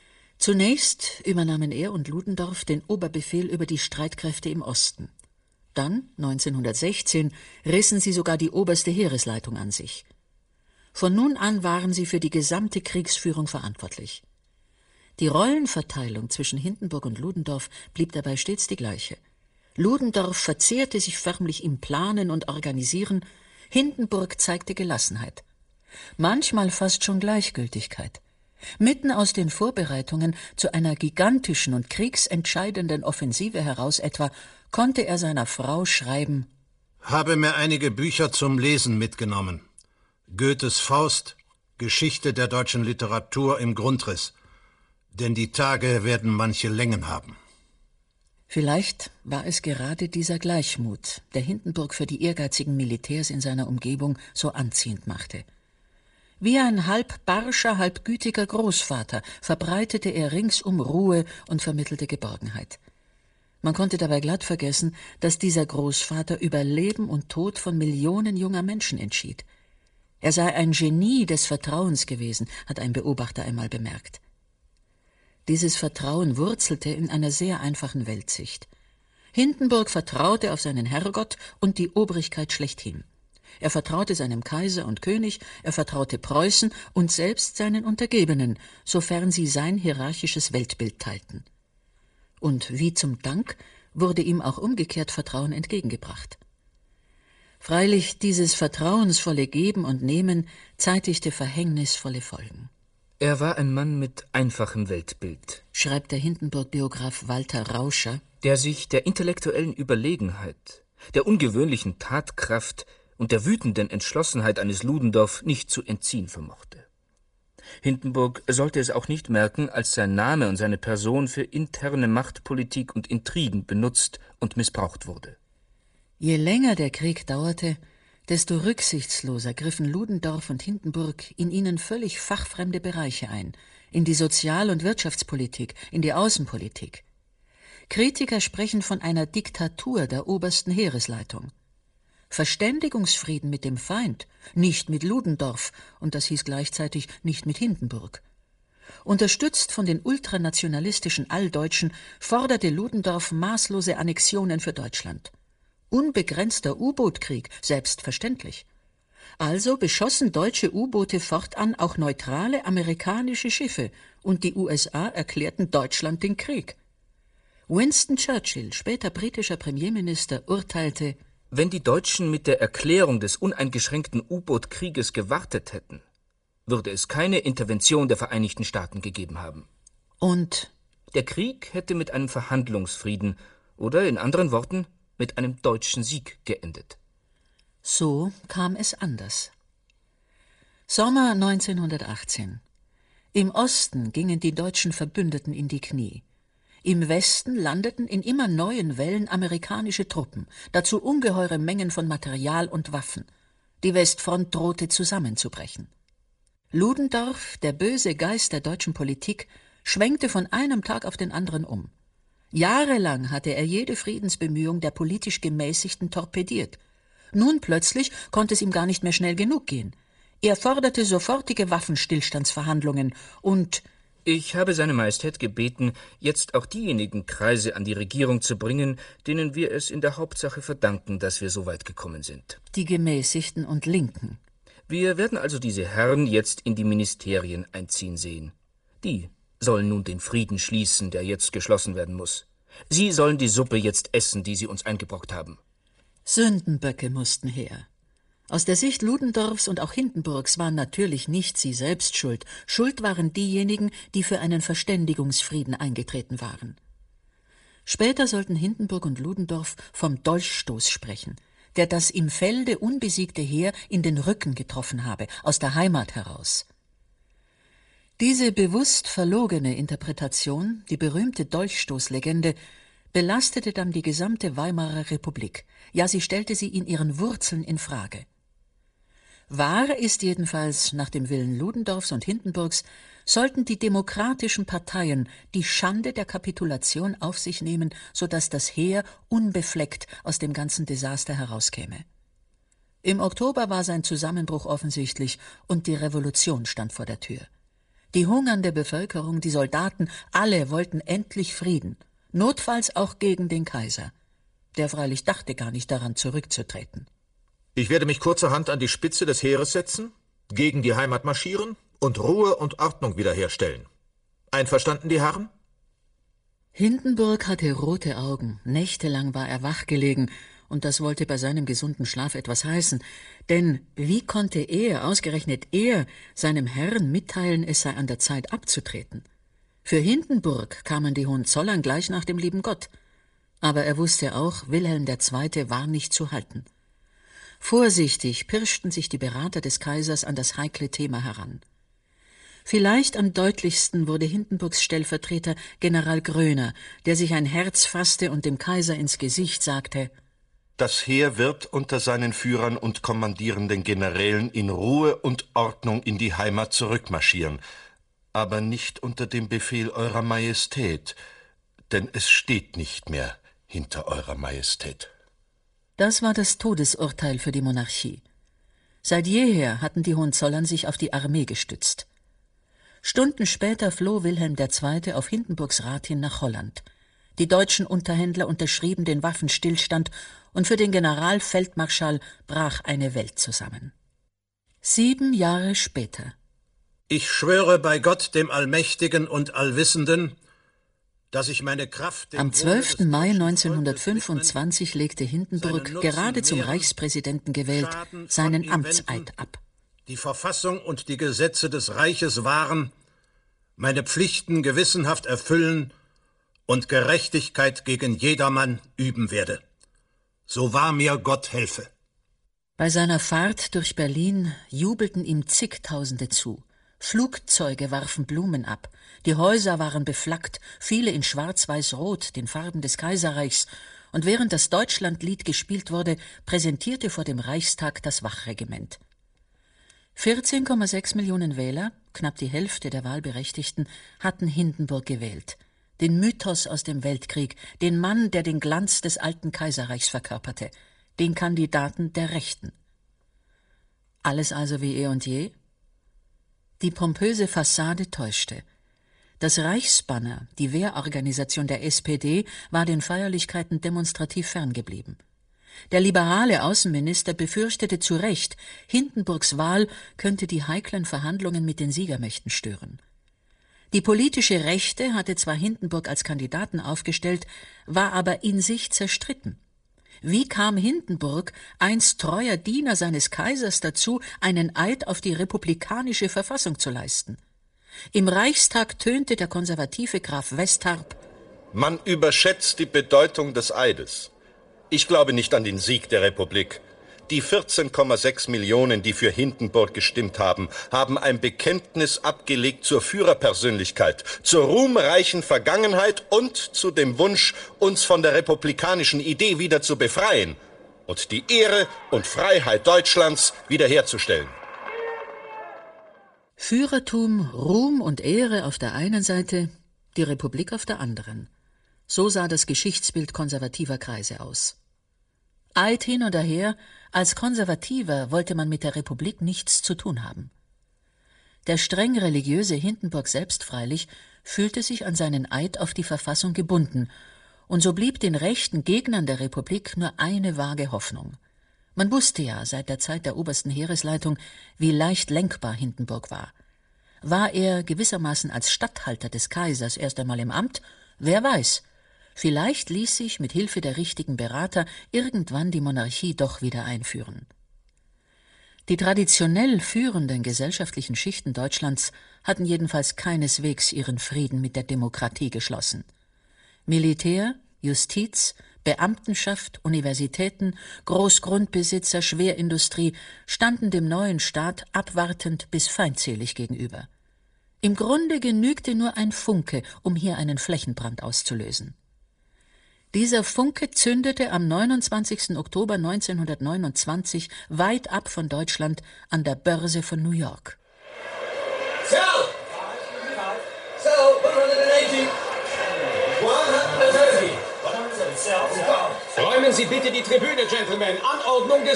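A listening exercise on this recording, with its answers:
Hören Sie sich das Hörspiel an und füllen Sie den Lückentext aus.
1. Ludendorff – und, in seinem Gefolge, Hindenburg – wandte sich bis fast zuletzt gegen alle Versuche, zu einem _____________________zu gelangen.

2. Vor allem aber setzten sich beide für einen _________________________ ein, was den Kriegseintritt Amerikas provozierte und maßgeblich zum Erfolg der Alliierten an der Westfront beitrug.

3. Im September 19_____ schwenkte Ludendorff um – wie üblich unterstützt von Hindenburg – und forderte sofortige _____________________________.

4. 19____ – sieben Jahre später: 14,6 Millionen Wahlberechtigte wählten Hindenburg zum ___________________.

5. Freilich zeigte sich bald, dass Hindenburg sich an seinen Eid auf die _____________________ gebunden fühlte.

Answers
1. Verständigungsfrieden
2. unbegrenzten U-Boot-Krieg
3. 18; Waffenstillstandsverhandlungen
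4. 25; Reichspräsidenten
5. Verfassung

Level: Q2 LK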